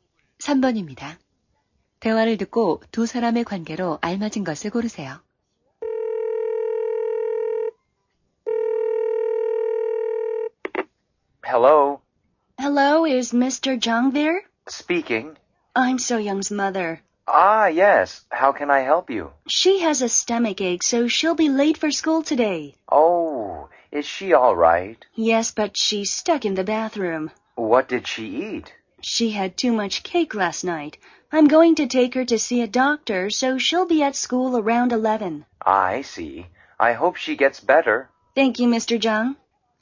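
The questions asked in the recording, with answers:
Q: 대화를 듣고 두 사람의 관계로 알맞은 것을 고르세요.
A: 교사와 학부모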